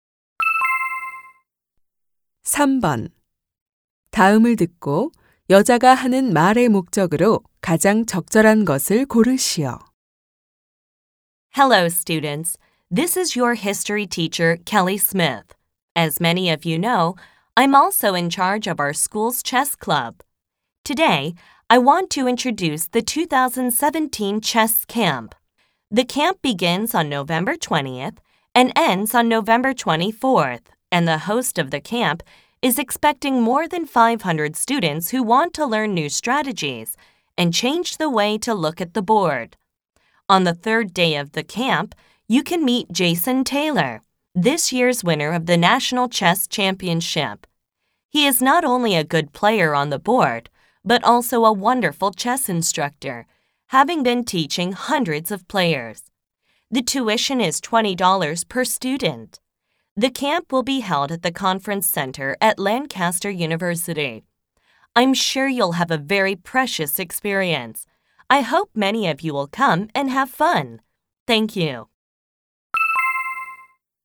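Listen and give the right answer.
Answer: 2017 체스 캠프를 소개하고 참가를 권하려고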